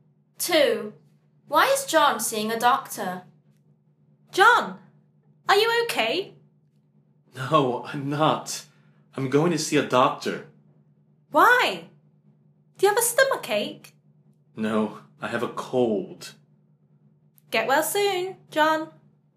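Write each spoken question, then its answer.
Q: Why is John seeing a doctor?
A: He has a cold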